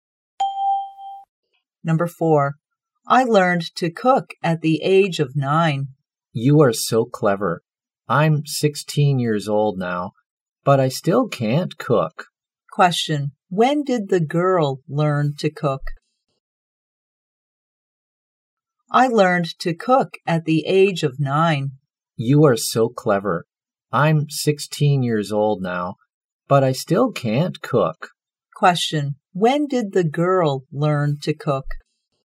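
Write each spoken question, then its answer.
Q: when did the girl learn to cook?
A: At the age of 9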